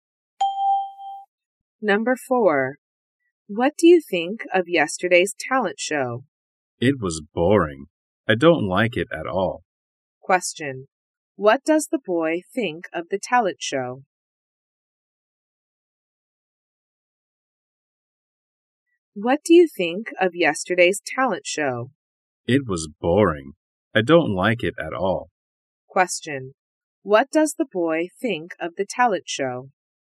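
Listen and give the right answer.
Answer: It was boring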